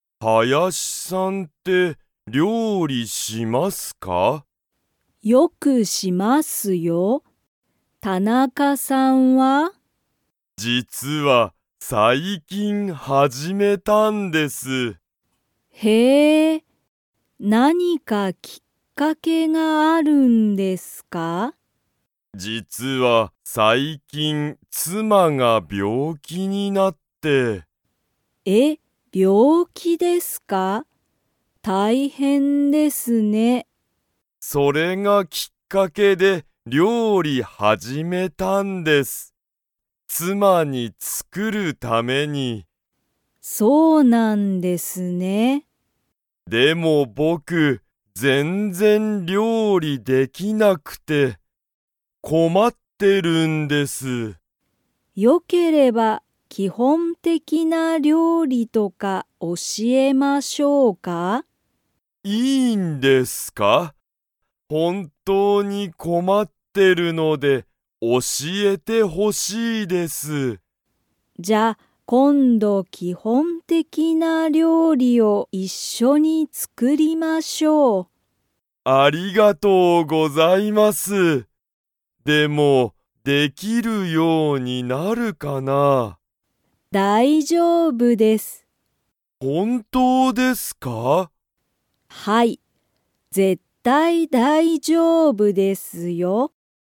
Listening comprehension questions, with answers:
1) 田中たなかさんは、妻つまの がきっかけで料理りょうりを始はじめた。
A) 仕事しごと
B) 大丈夫だいじょうぶ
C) 勉強べんきょう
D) 病気びょうき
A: 病気びょうき

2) 田中たなかさんは料理りょうりができますか?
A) はい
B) いいえ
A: いいえ

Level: Level 3

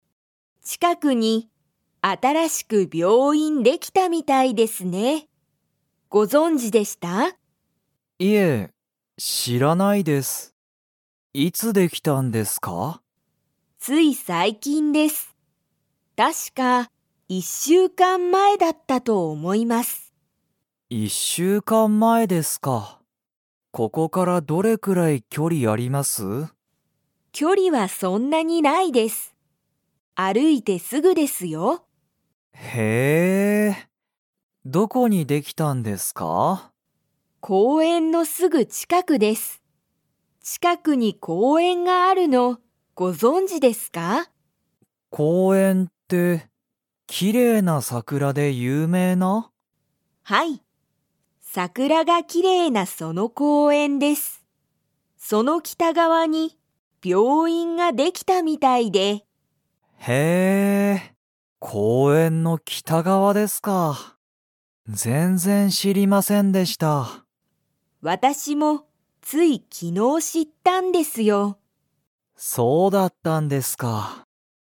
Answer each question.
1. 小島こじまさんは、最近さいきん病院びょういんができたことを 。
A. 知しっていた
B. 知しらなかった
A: 知しらなかった

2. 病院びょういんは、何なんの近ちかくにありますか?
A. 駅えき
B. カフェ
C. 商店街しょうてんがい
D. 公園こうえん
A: 公園こうえん

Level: Level 4

